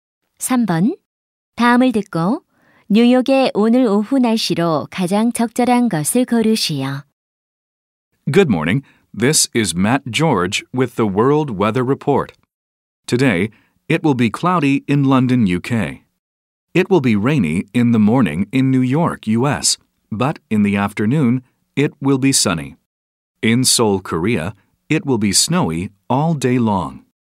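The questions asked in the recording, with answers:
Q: 다음을 듣고 뉴욕의 오늘 오후 날씨로 가장 적절한 것을 고르시오.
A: 맑음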